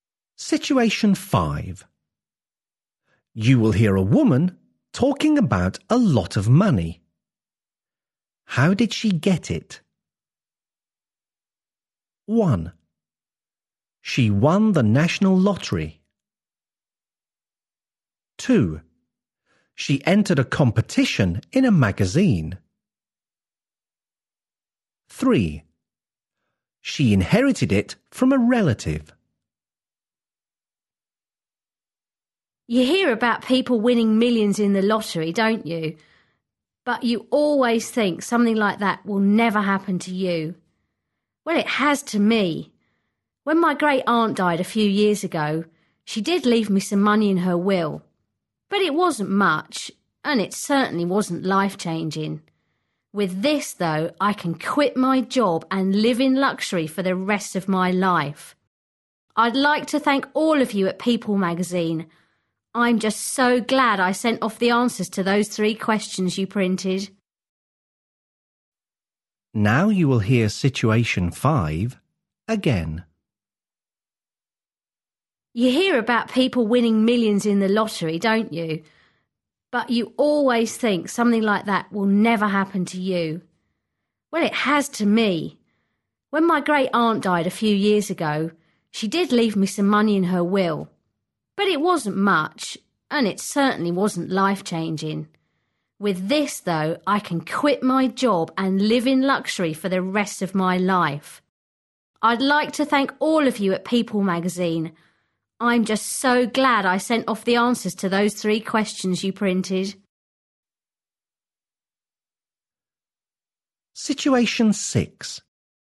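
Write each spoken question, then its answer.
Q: How did she get it?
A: 2: She entered a competition in a magazine.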